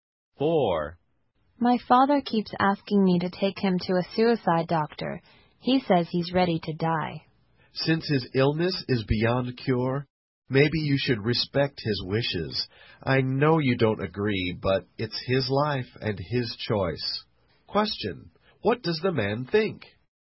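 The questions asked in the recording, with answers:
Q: What does the man think?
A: The father's wish to die should be respected.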